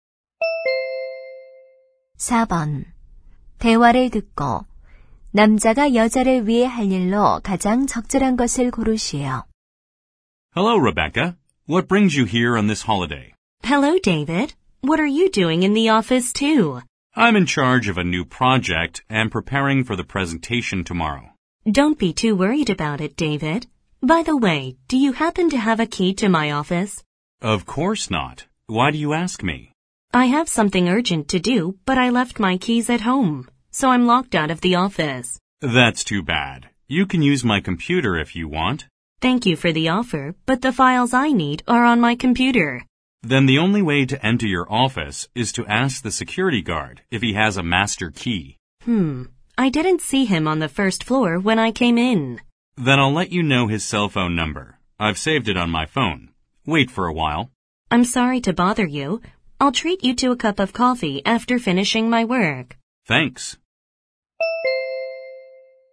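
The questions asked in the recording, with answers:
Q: 대화를 듣고 남자가 여자를 위해 할 일로 가장 적절한 것을 고르시오.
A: 경비원의 휴대전화 번호 알려주기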